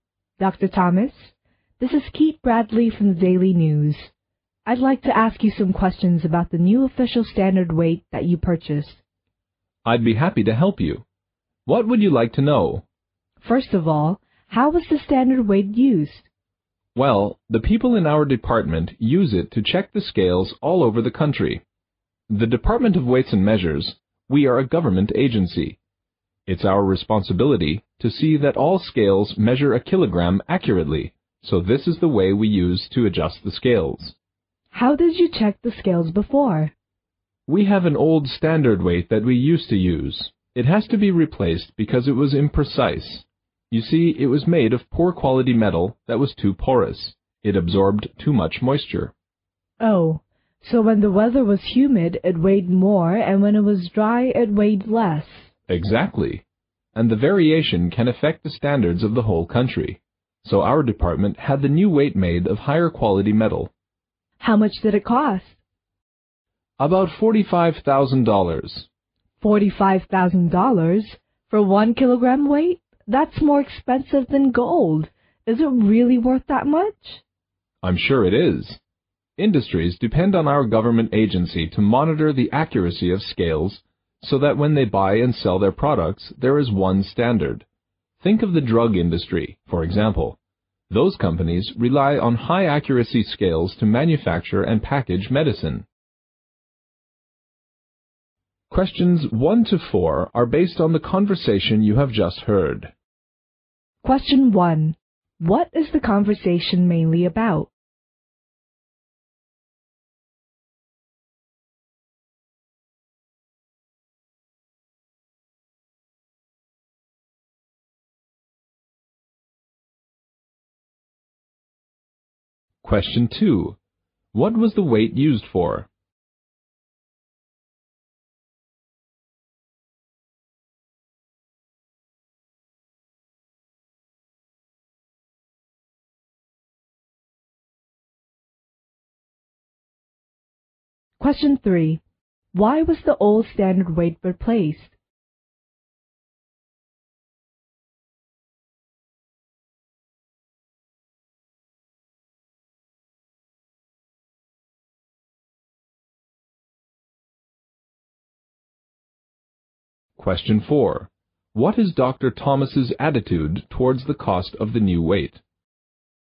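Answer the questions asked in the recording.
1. The new official standard weight the department bought
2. To check the accuracy of scales all over the country
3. It was imprecise because its porous, low-quality metal absorbed moisture
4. He thinks it is worth the cost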